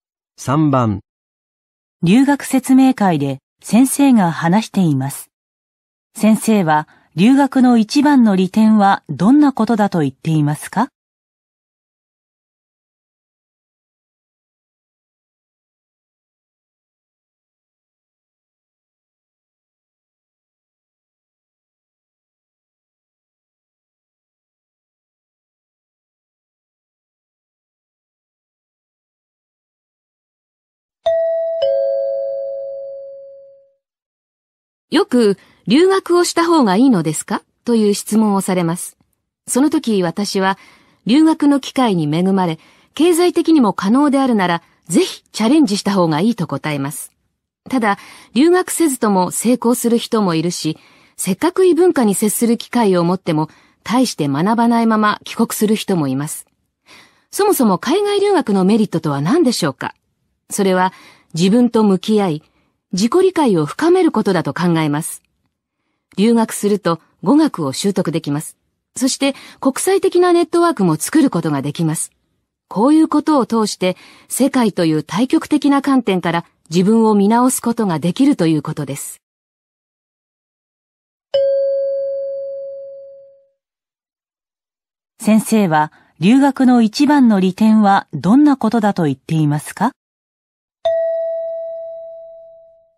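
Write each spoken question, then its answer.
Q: 留学の一番の利点はどんなことだと言っていますか?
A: 自分と向き合い、自己理解を深めること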